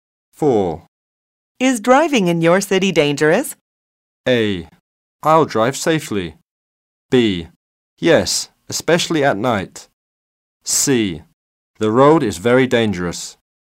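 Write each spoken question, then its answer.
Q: Is driving in your city dangerous?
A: B: Yes, especially at night.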